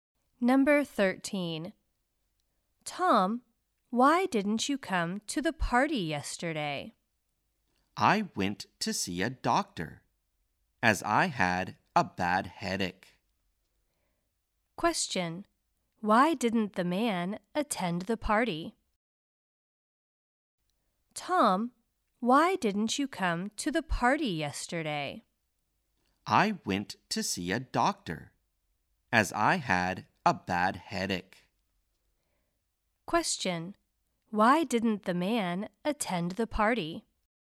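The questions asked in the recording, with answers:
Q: Why didn't the man attend the party?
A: He went to see a doctor because of a bad headache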